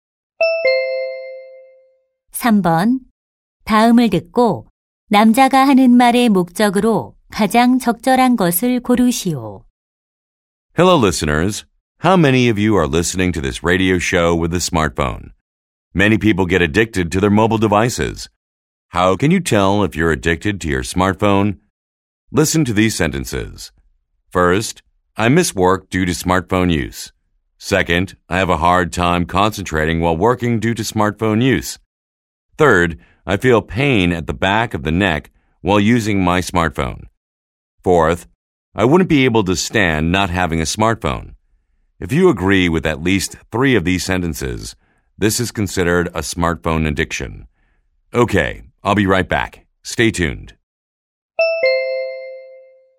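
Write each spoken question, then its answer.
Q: 다음을 듣고 남자가 하는 말의 목적으로 가장 적절한 것을 고르시오.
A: 스마트폰 중독 여부를 판단하는 방법을 알려 주려고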